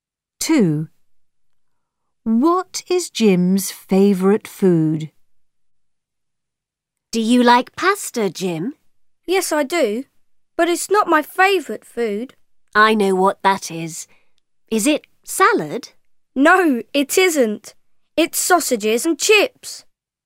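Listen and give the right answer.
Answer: sausages and chips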